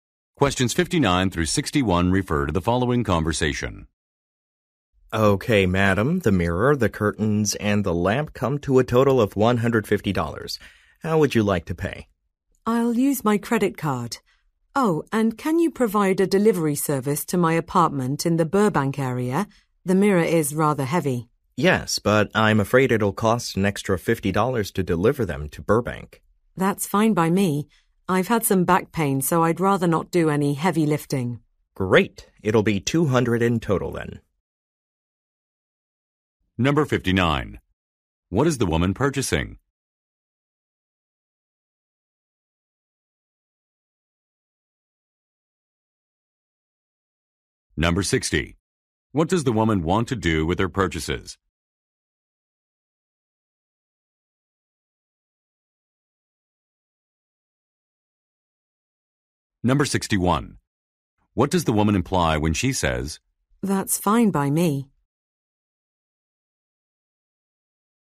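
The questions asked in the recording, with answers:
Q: What is the woman purchasing?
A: A mirror, curtains and a lamp

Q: What does the woman want to do with her purchases?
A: Have them delivered to her apartment

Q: What does the woman imply when she says, "That's fine by me"?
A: She is willing to pay the extra $50 delivery fee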